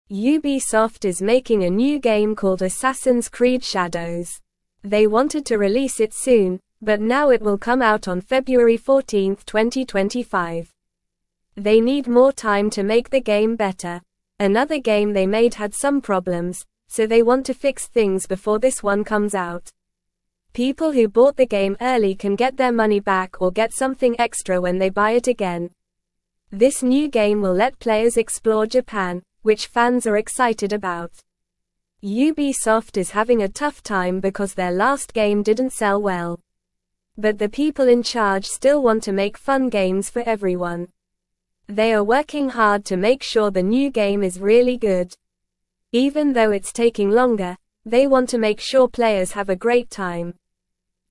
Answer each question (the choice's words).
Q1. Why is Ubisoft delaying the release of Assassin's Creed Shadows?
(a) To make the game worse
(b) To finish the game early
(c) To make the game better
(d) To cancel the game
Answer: To make the game better

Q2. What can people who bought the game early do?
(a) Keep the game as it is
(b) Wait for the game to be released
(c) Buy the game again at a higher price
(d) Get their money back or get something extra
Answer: Get their money back or get something extra

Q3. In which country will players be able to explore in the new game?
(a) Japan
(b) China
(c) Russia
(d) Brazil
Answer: Japan

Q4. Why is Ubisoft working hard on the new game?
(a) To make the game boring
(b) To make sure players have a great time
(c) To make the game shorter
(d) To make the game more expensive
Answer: To make sure players have a great time

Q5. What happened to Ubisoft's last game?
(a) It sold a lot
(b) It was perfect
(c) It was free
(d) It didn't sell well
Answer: It didn't sell well

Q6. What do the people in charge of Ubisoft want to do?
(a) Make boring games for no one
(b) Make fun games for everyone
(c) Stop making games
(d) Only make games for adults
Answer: Make fun games for everyone

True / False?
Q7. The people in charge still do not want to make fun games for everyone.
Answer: False

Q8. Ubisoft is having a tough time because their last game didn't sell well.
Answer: True

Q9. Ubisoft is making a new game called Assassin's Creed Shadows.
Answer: True

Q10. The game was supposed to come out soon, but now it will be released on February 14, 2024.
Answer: False

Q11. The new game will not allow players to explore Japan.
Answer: False

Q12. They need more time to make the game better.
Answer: True

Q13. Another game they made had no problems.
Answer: False

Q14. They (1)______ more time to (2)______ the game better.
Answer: need

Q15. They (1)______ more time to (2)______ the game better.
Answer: make

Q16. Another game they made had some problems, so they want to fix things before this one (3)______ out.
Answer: comes

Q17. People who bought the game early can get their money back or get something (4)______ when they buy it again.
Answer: extra

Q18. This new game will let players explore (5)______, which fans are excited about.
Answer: Japan

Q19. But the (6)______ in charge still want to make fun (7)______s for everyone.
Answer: people

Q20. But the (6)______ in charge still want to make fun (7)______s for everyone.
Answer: game

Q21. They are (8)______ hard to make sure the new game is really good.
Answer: working

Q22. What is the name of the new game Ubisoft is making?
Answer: Assassin's Creed Shadows.

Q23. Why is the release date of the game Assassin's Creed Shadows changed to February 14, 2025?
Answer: Ubisoft needed more time to make the game better.

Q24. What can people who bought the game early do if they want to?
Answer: They can get their money back or get something extra when they buy it again.

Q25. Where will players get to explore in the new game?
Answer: Players will get to explore Japan.

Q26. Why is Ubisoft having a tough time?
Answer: Their last game didn't sell well.

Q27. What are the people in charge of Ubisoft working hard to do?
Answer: They are working hard to make sure the new game is really good.

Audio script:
They wanted to release it soon, but now it will come out on February 14, 2025. Another game they made had some problems, so they want to fix things before this one comes out. People who bought the game early can get their money back or get something extra when they buy it again.
This new game will let players explore Japan, which fans are excited about. But the people in charge still want to make fun games for everyone. They are working hard to make sure the new game is really good. Even though it's taking longer, they want to make sure players have a great time.

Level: Level 1